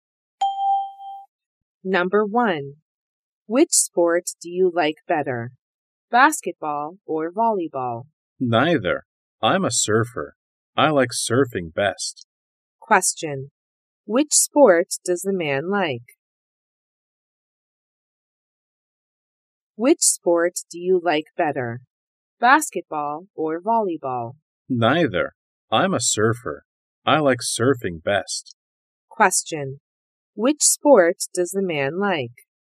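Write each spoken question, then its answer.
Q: Which sport does the man like?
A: Surfing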